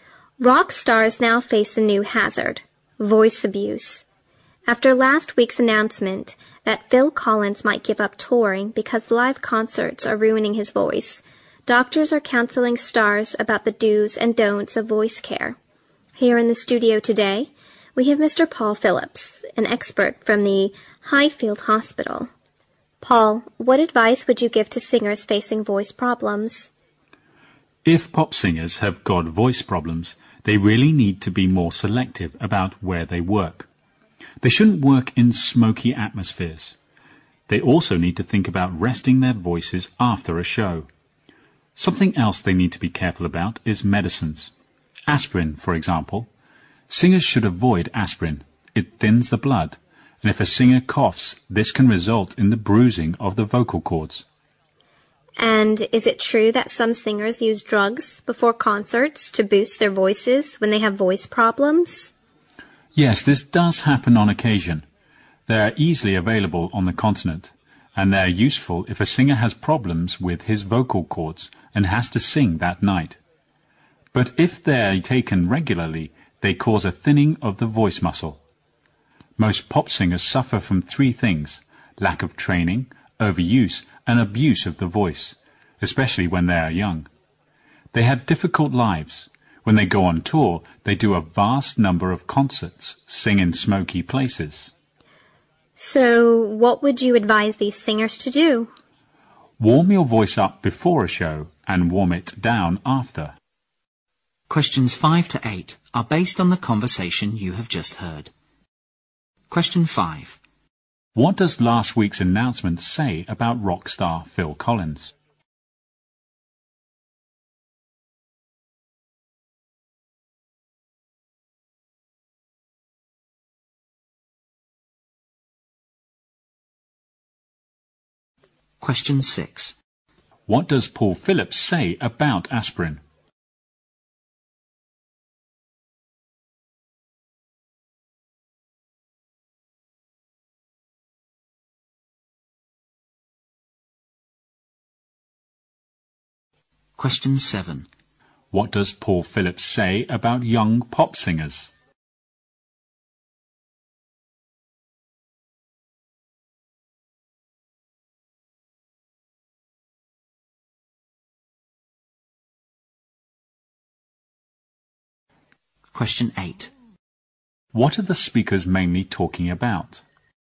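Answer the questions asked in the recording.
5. He might give up touring because live concerts are ruining his voice.
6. Singers should avoid it because it thins the blood, and coughing can then bruise the vocal cords.
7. They suffer from lack of training, overuse and abuse of the voice.
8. Voice problems of rock/pop singers and how to care for the voice.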